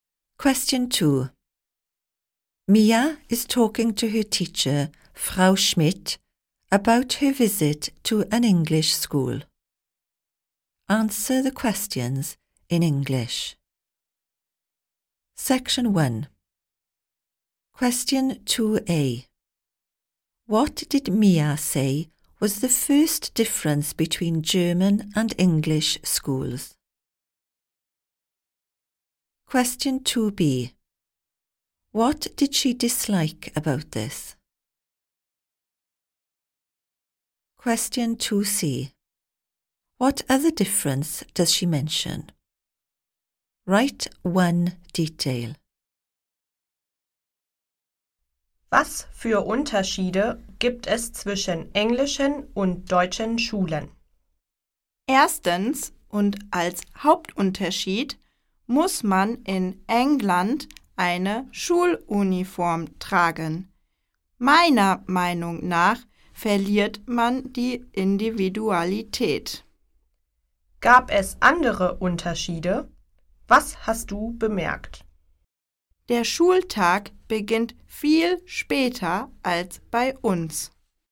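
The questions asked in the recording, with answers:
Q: What did Mia say was the first difference between German and English schools?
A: In England you have to wear a school uniform

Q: What did she dislike about this?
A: You lose your individuality

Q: What other difference does she mention?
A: The school day starts much later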